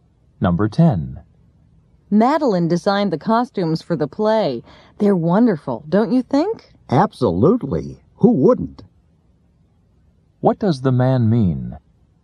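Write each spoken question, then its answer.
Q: What does the man mean?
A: He thinks the costumes are wonderful too.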